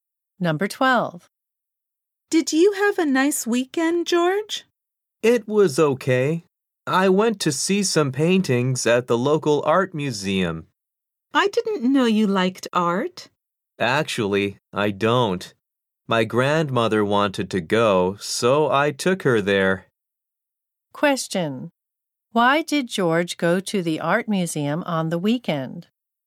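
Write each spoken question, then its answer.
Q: Why did George go to the art museum on the weekend?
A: His grandmother wanted to go, so he took her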